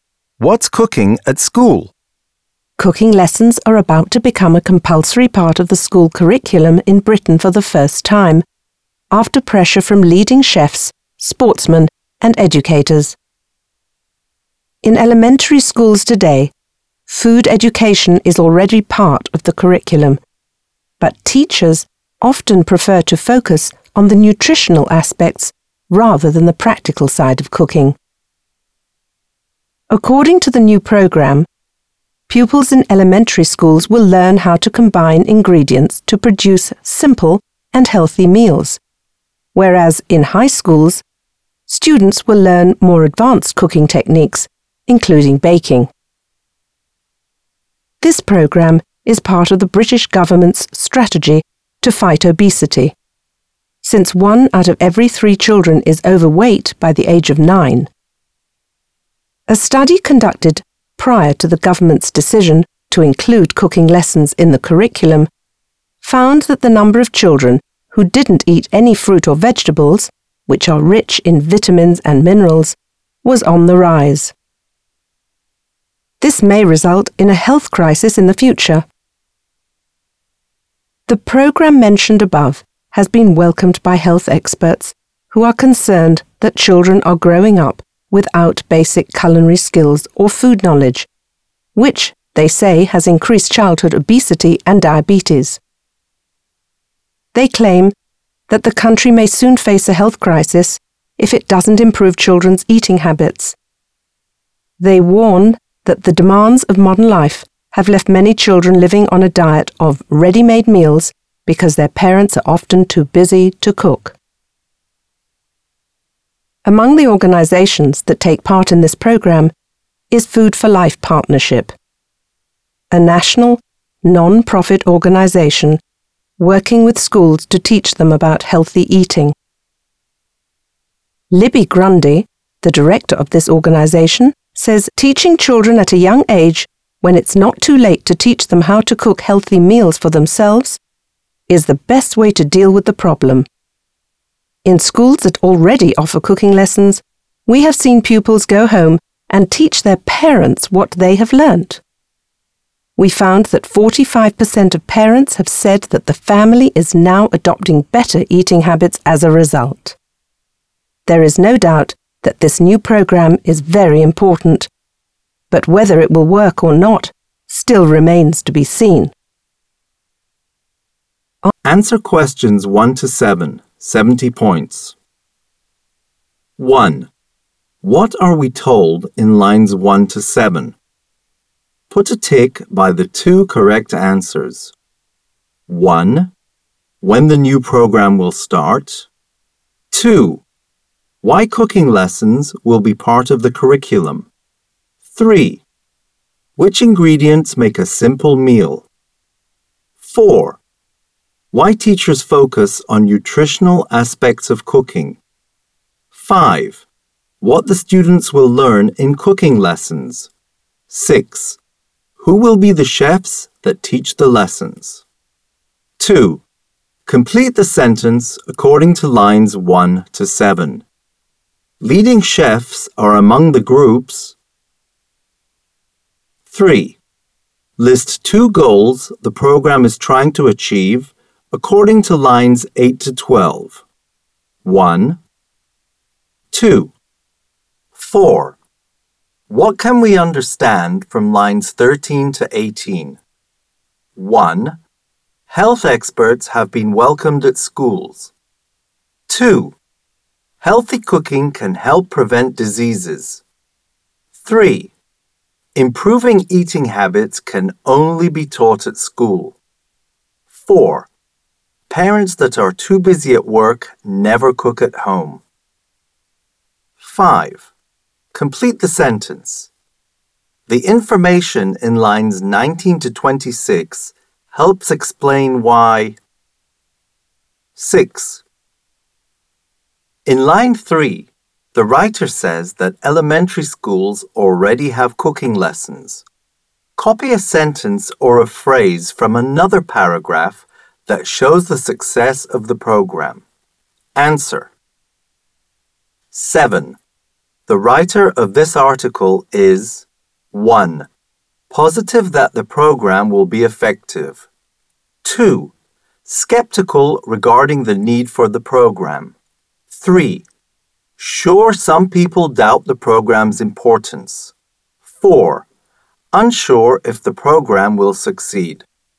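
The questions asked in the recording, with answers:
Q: What are we told in lines 1 to 7?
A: 2: Why cooking lessons will be part of the curriculum; 5: What the students will learn in cooking lessons

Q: What can we understand from lines 13 to 18?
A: 2: Healthy cooking can help prevent diseases.

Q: The writer of this article is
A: 4: Unsure if the program will succeed.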